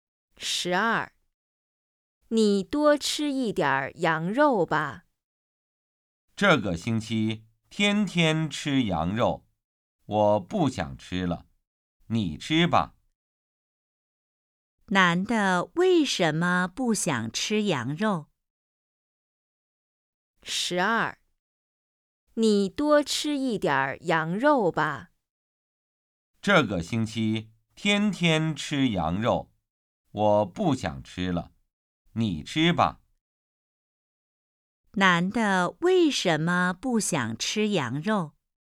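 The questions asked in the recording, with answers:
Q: 男的为什么不想吃羊肉?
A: 这个星期天天吃羊肉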